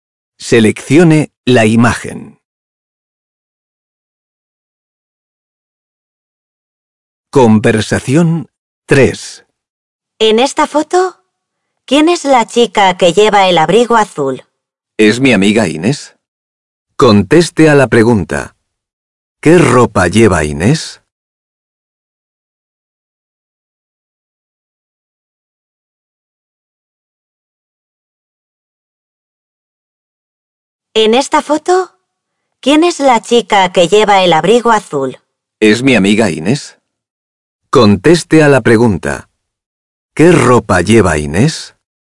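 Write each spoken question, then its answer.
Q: ¿Qué ropa lleva Inés?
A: Un abrigo azul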